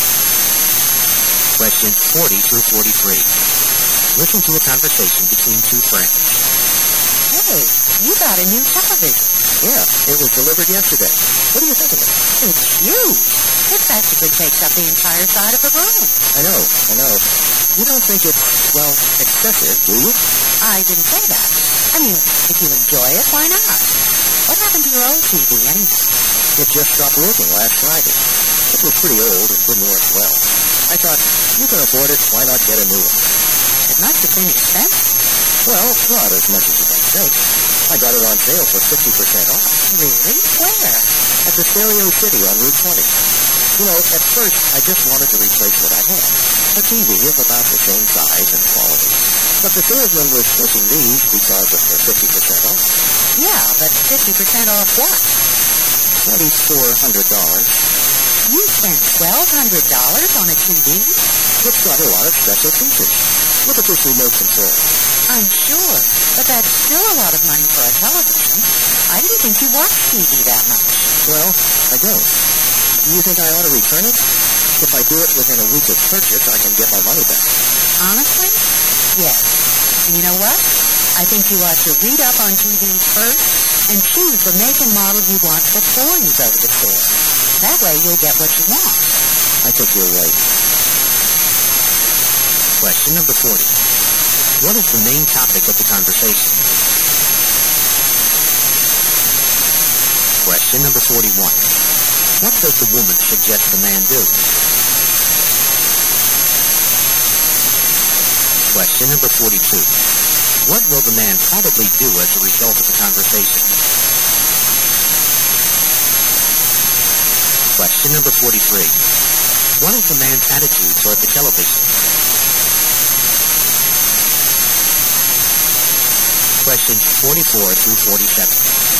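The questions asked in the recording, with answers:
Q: What is the main topic of the conversation?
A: The man's expensive new television

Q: What does the woman suggest the man do?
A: Return the TV and read up on TVs before buying one

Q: What will the man probably do as a result of the conversation?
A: Return the television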